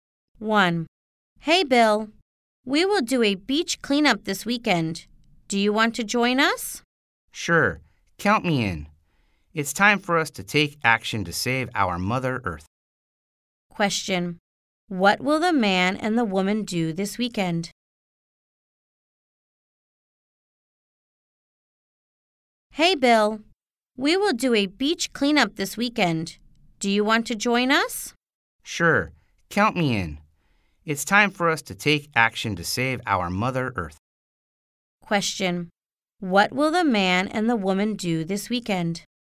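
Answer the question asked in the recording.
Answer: Do a beach cleanup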